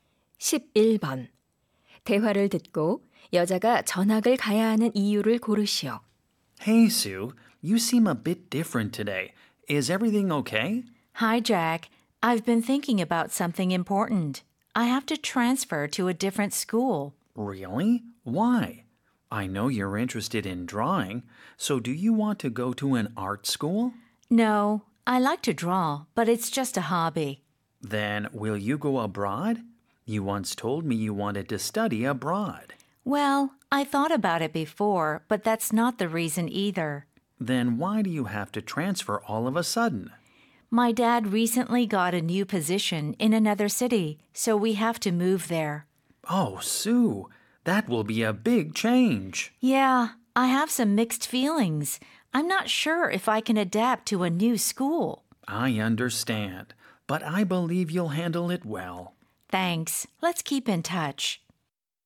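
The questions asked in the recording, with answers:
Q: 대화를 듣고 여자가 전학을 가야 하는 이유를 고르시오.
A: 아버지가 다른 도시에서 새 직책을 맡게 되어서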